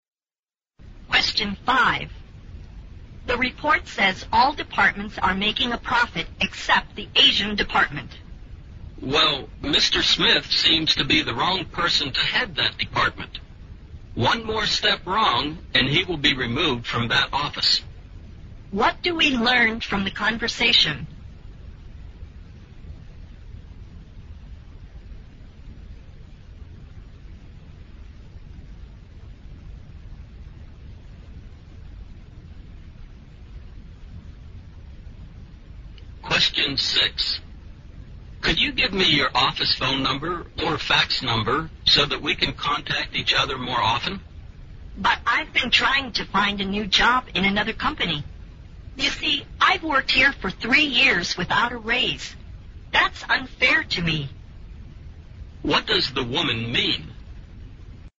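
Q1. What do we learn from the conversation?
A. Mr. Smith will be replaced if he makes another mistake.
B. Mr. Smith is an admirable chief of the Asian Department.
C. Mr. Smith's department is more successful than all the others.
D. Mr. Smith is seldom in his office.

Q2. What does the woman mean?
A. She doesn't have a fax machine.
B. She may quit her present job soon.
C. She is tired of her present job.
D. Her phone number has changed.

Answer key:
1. A
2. B

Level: 六级

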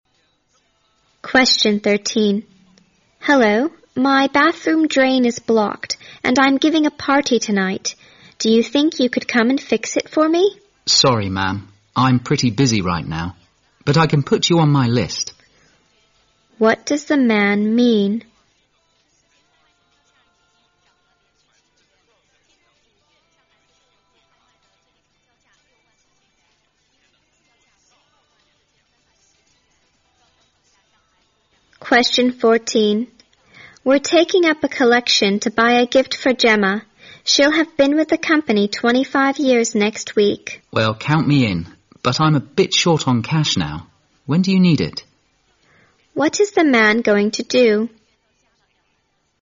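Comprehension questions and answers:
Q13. What does the man mean? (____)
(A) He will send someone right away.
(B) He has to do other repairs first.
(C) The woman can call later that day.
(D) The woman can try to fix it herself.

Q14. What is the man going to do? (____)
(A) Take up collection next week.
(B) Give his contribution some time later.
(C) Buy an expensive gift for Gemma.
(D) Borrow some money from the woman.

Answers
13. B
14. B

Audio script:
W: Hello, my bathroom drain is blocked and I'm giving a party tonight. Do you think you could come and fix it for me?
M: Sorry, ma'am. I'm pretty busy right now. But I can put you on my list.
W: We're taking up a collection to buy a gift for Jemma. She'll have been with the company 25 years next week.
M: Well, count me in. But I'm a bit short on cash now. When do you need it?

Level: 大学英语六级

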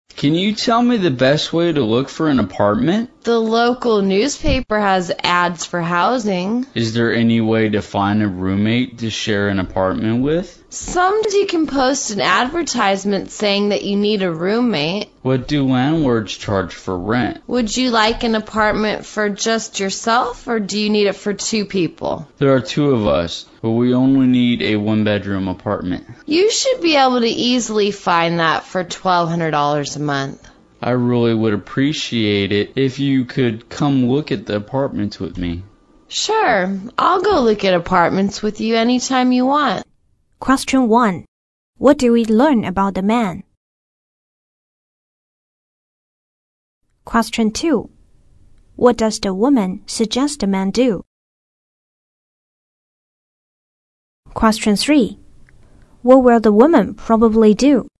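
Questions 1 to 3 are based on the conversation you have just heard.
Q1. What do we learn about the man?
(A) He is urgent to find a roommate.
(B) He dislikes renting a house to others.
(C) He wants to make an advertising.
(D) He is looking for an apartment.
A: D

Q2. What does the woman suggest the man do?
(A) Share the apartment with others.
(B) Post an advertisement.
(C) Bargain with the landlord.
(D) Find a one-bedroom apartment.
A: B

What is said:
M: Can you tell me the best way to look for an apartment?
W: The local newspaper has ads for housing.
M: Is there any way to find a roommate to share an apartment with?
W: Sometimes you can post an advertisement saying that you need a roommate.
M: What do landlords charge for rent?
W: Would you like an apartment for just yourself, or do you need it for two people?
M: There are two of us, but we only need a one-bedroom apartment.
W: You should be able to easily find that for twelve hundred dollars a month.
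M: I really would appreciate it if you could come look at apartments with me.
W: Sure, I'll go look at apartments with you anytime you want.

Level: 英语四级

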